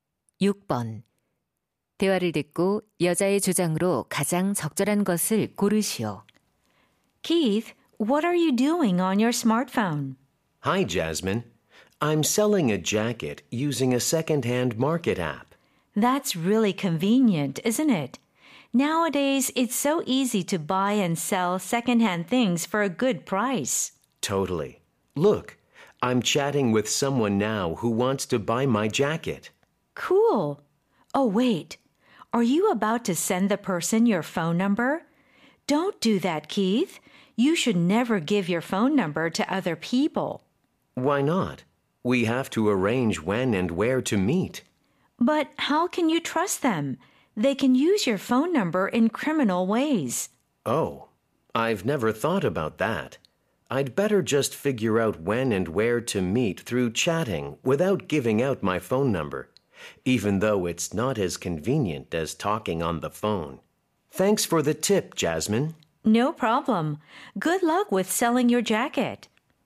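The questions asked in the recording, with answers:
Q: 대화를 듣고 여자의 주장으로 가장 적절한 것을 고르시오.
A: 중고 거래 시 다른 사람에게 전화번호를 알려주지 말아야 한다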